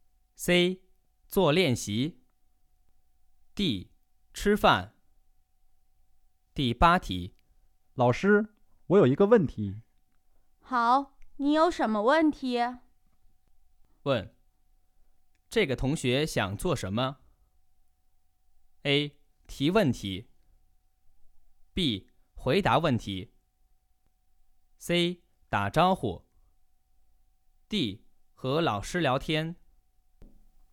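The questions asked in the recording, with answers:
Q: 问,这个同学想做什么?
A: A: 提问题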